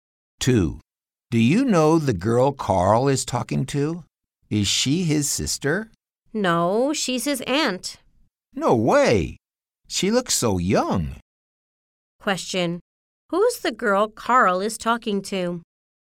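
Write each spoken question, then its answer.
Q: Who's the girl Carl is talking to?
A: His aunt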